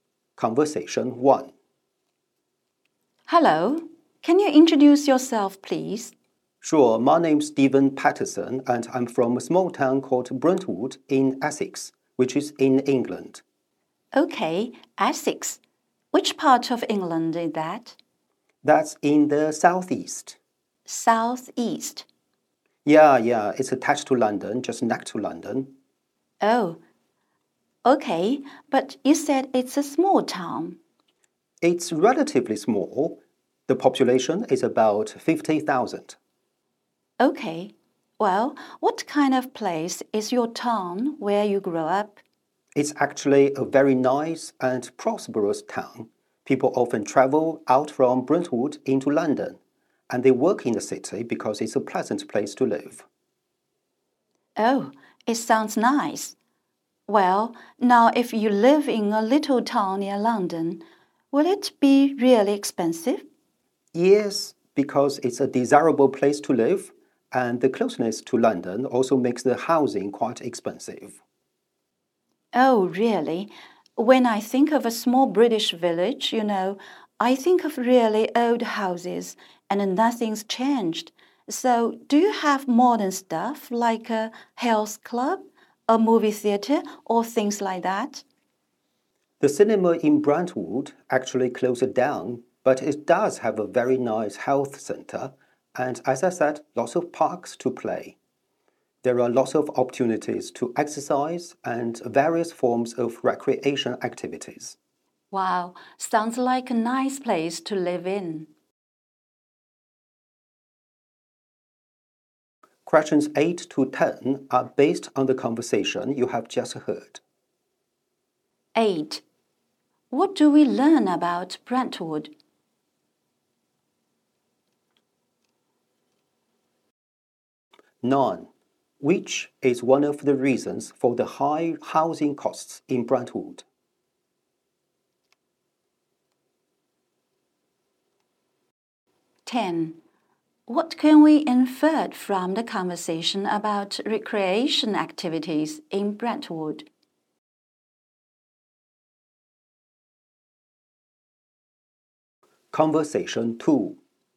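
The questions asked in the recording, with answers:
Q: Which is one of the reasons for the high housing costs in Brentwood?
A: Its closeness to London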